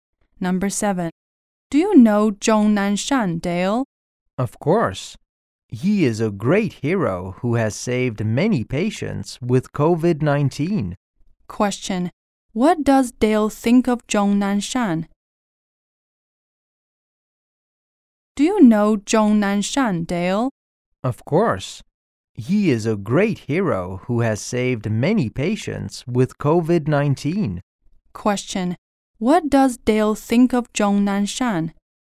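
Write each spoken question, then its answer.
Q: Question, what does Dale think of Zhong Nanshan?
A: He is a great hero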